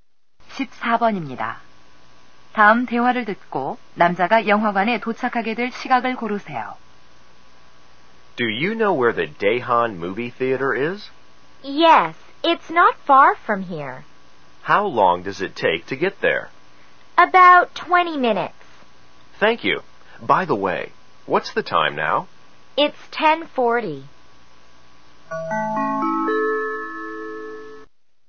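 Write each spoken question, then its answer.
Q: 다음 대화를 듣고 남자가 영화관에 도착하게 될 시각을 고르세요.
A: 11시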